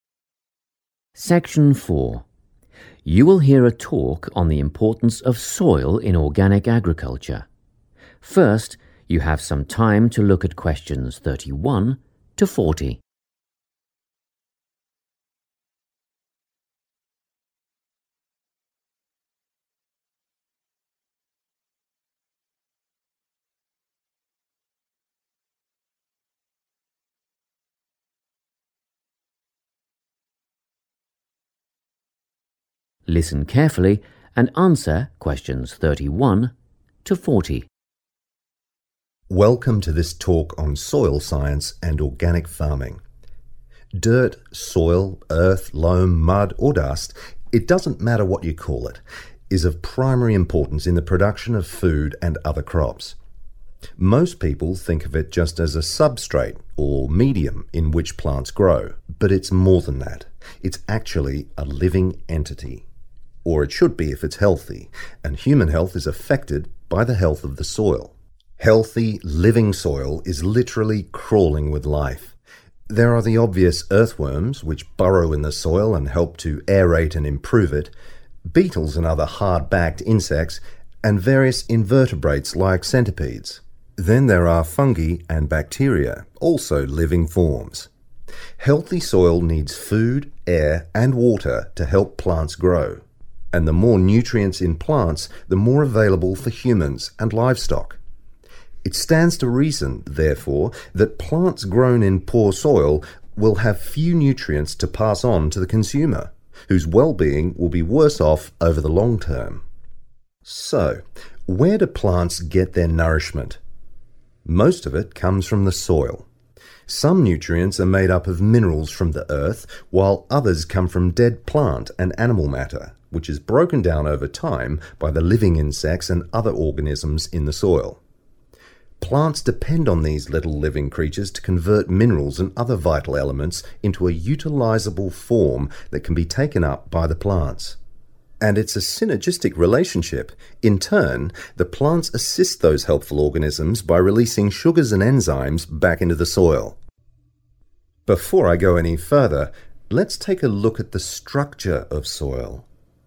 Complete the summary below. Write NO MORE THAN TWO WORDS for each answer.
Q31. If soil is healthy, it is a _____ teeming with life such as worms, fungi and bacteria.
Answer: living entity

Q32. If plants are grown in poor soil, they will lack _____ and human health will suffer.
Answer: nutrients

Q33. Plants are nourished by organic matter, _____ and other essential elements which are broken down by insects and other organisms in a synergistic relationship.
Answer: minerals

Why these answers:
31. The correct answer is 'living entity' because the speaker describes healthy soil as being more than just a place where plants grow; it is alive. The text explicitly states that soil 'is actually a living entity' if it is healthy. The summary says it is 'teeming with life,' which matches the part of the talk where the speaker says soil is 'crawling with life,' such as worms, insects, fungi, and bacteria.
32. The correct answer is "nutrients" because the speaker explains the relationship between soil quality and human health. According to the talk, if the soil is bad ("poor soil"), the plants will only have a small amount ("few") of healthy substances to give to the people who eat them. This shortage of nutrients leads to the person's health ("well-being") becoming worse.
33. The correct answer is "minerals" because the transcript says plants get their food (nourishment) from two sources: "minerals from the earth" and "dead plant and animal matter" (which is organic matter). These materials are changed into a form plants can eat by bugs and other small living things in the dirt. This process is part of a "synergistic relationship," which means the plants and the organisms help each other.

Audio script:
Section 4
You will hear a talk on the importance of soil in organic agriculture. First you have some time to look at questions 31 to 40.
Listen carefully and answer questions 31 to 40.
Welcome to this talk on soil science and organic farming. Dirt, soil, earth, loam, mud or dust - it doesn't matter what you call it - is of primary importance in the production of food and other crops. Most people think of it just as a substrate (or medium) in which plants grow, but it's more than that, it's actually a living entity - or it should be if it's healthy - and human health is affected by the health of the soil.
Healthy, living soil is literally crawling with life - there are the obvious earthworms, which burrow in the soil and help to aerate and improve it, beetles and other hard-backed insects, and various invertebrates like centipedes. Then there are fungi and bacteria - also living forms. Healthy soil needs food, air and water to help plants grow ... and the more nutrients in plants, the more available for humans and livestock. It stands to reason, therefore, that plants grown in poor soil will have few nutrients to pass on to the consumer, whose well-being will be worse-off over the long term.
So, where do plants get their nourishment? Most of it comes from the soil. Some nutrients are made up of minerals from the earth, while others come from dead plant and animal matter which is broken down over time by the living insects and other organisms in the soil. Plants depend on these little living creatures to convert minerals and other vital elements into a utilisable form that can be taken up by the plants. And it's a synergistic relationship - in turn, the plants assist those helpful organisms by releasing sugars and enzymes back into the soil.
Before I go any further, let's take a look at the structure of soil.